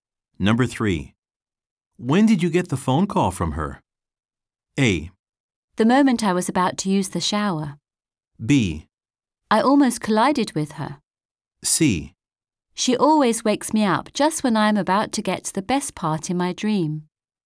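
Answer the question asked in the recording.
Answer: A: The moment I was about to use the shower.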